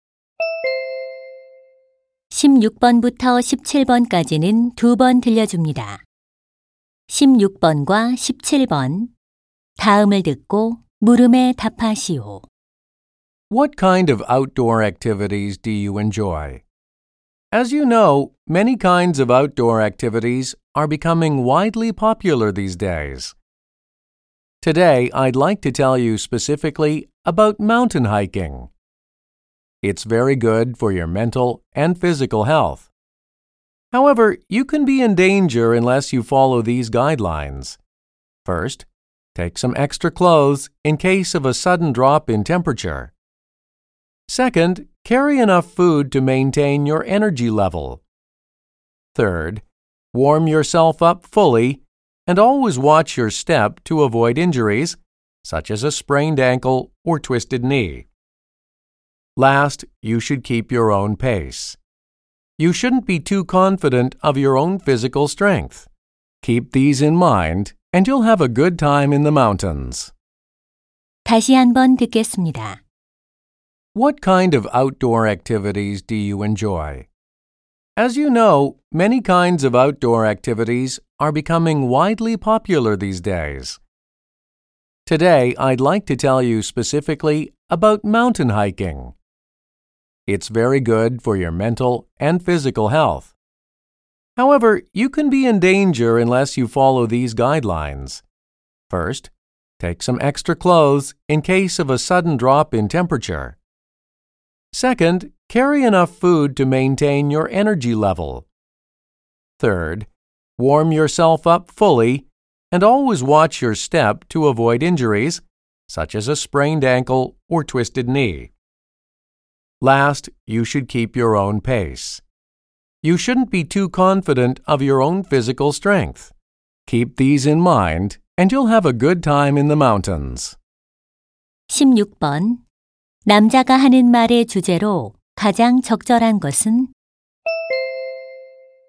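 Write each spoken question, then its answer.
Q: 남자가 하는 말의 주제로 가장 적절한 것은?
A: 안전한 등산을 위한 수칙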